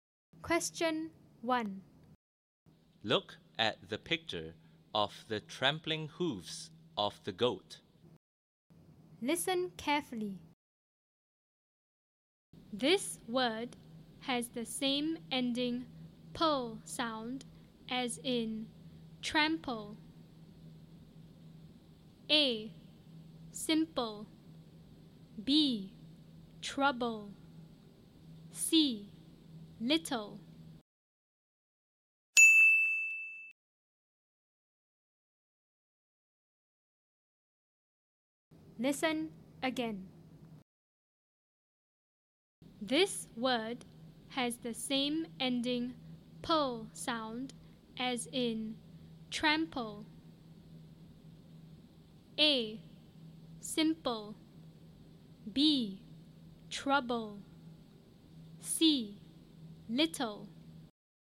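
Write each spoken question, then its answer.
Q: This word has the same ending "pull" sound as in trample.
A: A: Simple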